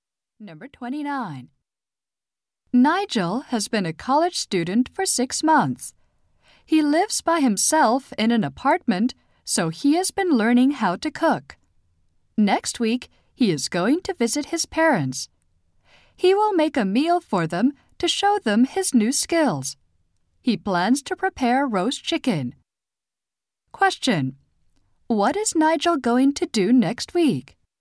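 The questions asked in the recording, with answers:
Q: Question: What is Nigel going to do next week?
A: Cook a meal for his parents.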